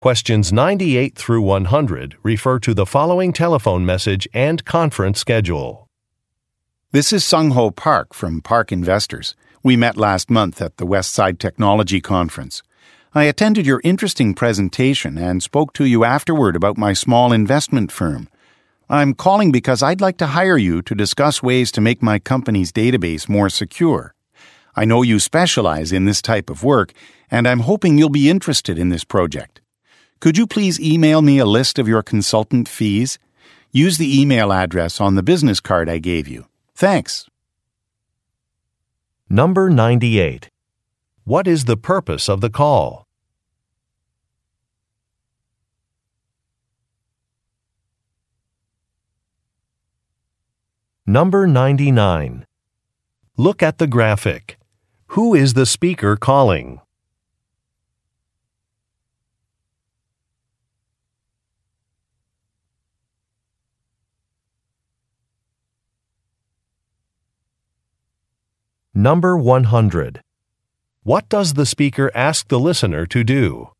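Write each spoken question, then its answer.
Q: What is the purpose of the call?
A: To hire the listener to help make his company's database more secure

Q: What does the speaker ask the listener to do?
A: Email him a list of consultant fees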